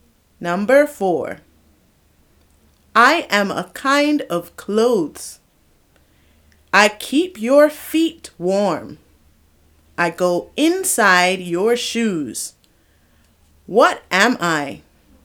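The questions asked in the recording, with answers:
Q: What am I?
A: socks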